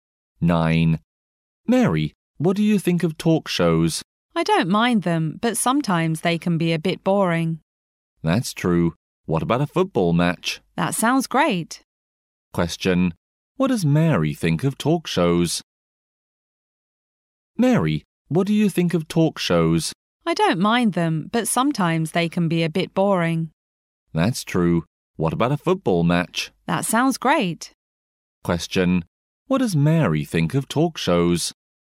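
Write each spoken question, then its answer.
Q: Question. What does Mary think of talk shows?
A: She doesn't mind them, but they can be a bit boring.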